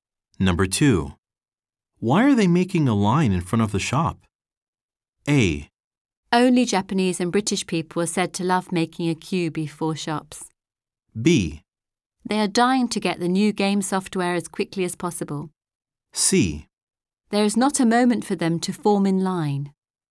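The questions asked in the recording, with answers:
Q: Why are they making a line in front of the shop?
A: B: They are dying to get the new game software as quickly as possible.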